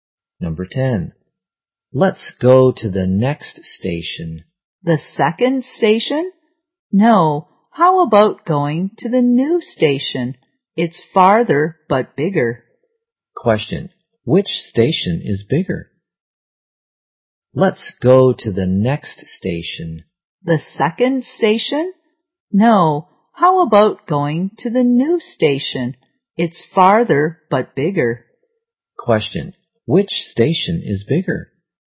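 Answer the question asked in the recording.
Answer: The new station.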